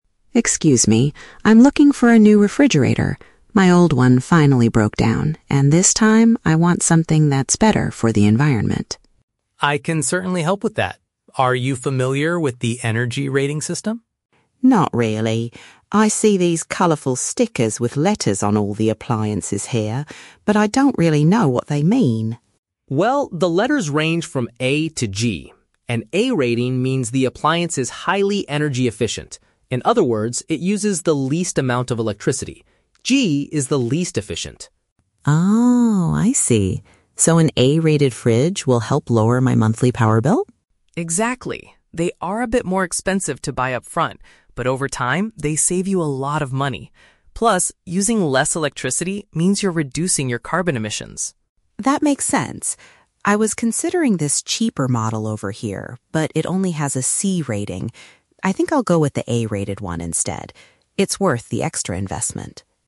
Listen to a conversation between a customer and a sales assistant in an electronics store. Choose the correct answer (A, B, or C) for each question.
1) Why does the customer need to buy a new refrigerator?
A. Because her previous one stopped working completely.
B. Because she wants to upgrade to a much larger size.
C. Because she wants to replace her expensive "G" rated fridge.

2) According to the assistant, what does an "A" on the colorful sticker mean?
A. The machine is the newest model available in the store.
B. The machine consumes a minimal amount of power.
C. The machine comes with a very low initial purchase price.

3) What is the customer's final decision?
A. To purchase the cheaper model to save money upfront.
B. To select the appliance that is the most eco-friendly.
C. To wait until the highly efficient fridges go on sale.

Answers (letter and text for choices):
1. A. Because her previous one stopped working completely.
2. B. The machine consumes a minimal amount of power.
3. B. To select the appliance that is the most eco-friendly.

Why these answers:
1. Mary says, "My old one finally broke down." (Paraphrasing: stopped working completely = broke down). Why the trap is wrong: Option (C) is a trap. The letter "G" is mentioned by the assistant as the least efficient rating, but Mary does not say her old fridge was G-rated. Option (B) is a plausible reason for buying a fridge but is never mentioned.
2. Dan explains that an "A" rating means it is "highly energy-efficient" and "uses the least amount of electricity." (Paraphrasing: consumes a minimal amount of power = uses the least amount of electricity). Why the trap is wrong: Option (C) is the trap. The assistant actually says A-rated fridges are "more expensive to buy upfront" (high initial price), not low. Option (A) is not mentioned.
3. Mary decides to buy the A-rated fridge, which Dan explained uses less electricity and reduces carbon emissions. Mary also stated at the beginning she wanted something "better for the environment." (Paraphrasing: most eco-friendly = better for the environment / A-rated / reduces carbon emissions). Why the trap is wrong: Option (A) is a very strong trap. Mary says, "I was considering this cheaper model over here," but then uses the word "but" to reject it because it only has a "C" rating. She decides the A-rated one is "worth the extra investment." Option (C) is unmentioned.

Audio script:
Mary: Excuse me, I'm looking for a new refrigerator. My old one finally broke down, and this time, I want something that's better for the environment.
Dan: I can certainly help with that. Are you familiar with the energy rating system?
Mary: Not really. I see these colorful stickers with letters on all the appliances here, but I don't really know what they mean.
Dan: Well, the letters range from A to G. An "A" rating means the appliance is highly energy-efficient. In other words, it uses the least amount of electricity. "G" is the least efficient.
Mary: Oh, I see. So an A-rated fridge will help lower my monthly power bill?
Dan: Exactly. They are a bit more expensive to buy upfront, but over time, they save you a lot of money. Plus, using less electricity means you're reducing your carbon emissions.
Mary: That makes sense. I was considering this cheaper model over here, but it only has a "C" rating. I think I'll go with the A-rated one instead. It's worth the extra investment.